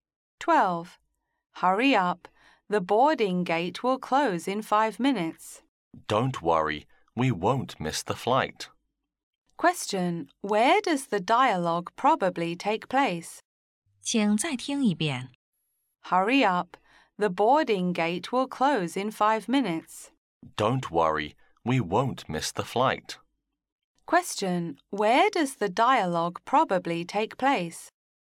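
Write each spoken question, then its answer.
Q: Where does the dialogue probably take place?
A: At the airport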